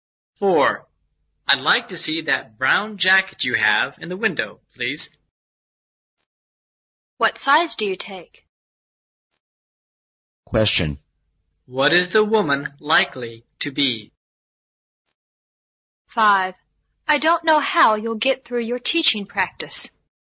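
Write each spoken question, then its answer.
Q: What is the woman likely to be?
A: A shop assistant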